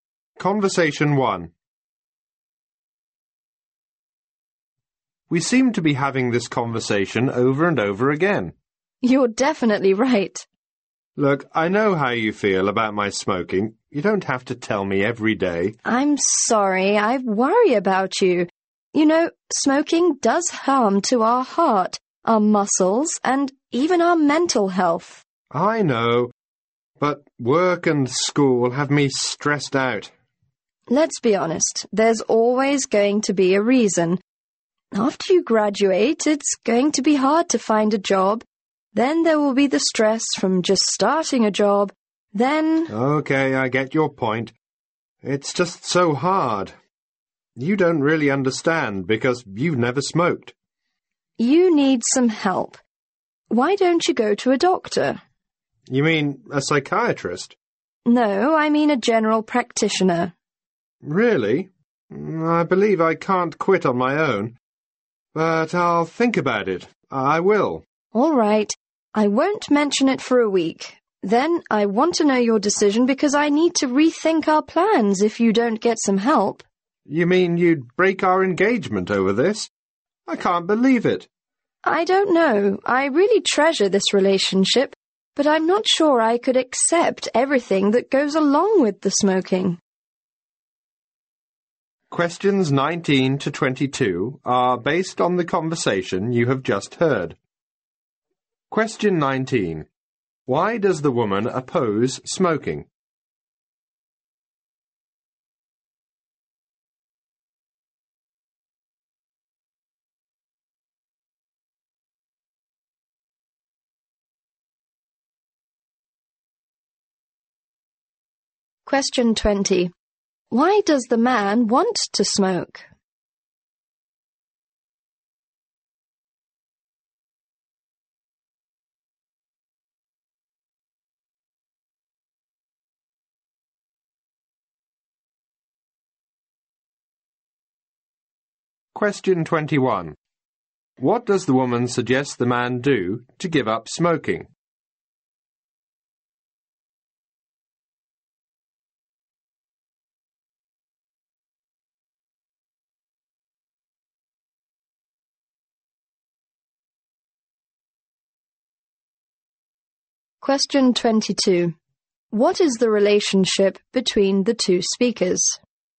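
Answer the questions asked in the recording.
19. It harms health
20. He is stressed by work and school
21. See a general practitioner
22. An engaged couple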